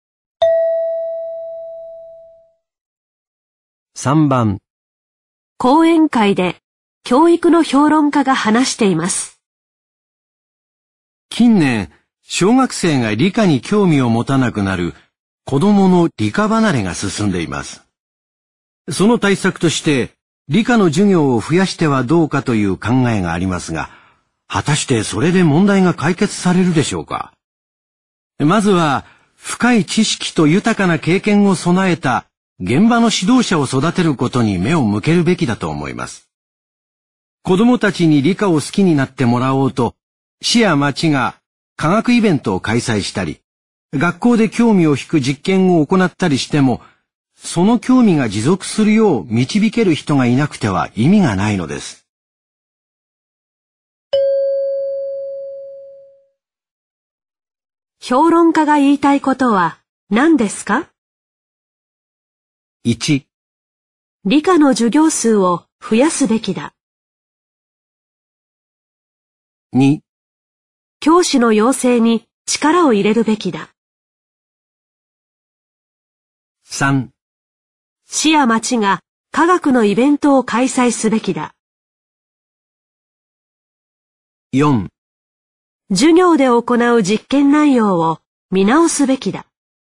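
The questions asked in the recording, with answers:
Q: 評論家が言いたいことは何ですか?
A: 2: 教師の養成に力を入れるべきだ。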